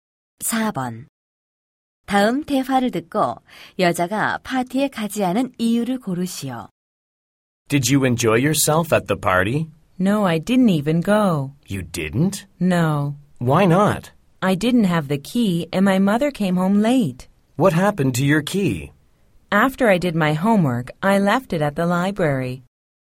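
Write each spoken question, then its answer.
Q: 다음 대화를 듣고 여자가 파티에 가지 않은 이유를 고르시오.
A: 열쇠를 도서관에 두고 와서 집에 들어갈 수 없었기 때문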